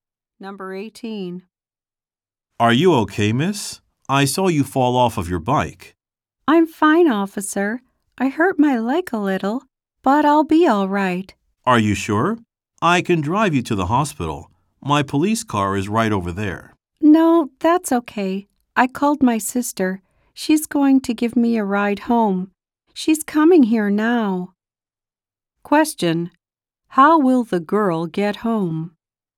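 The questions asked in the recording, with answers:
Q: How will the girl get home?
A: Her sister will give her a ride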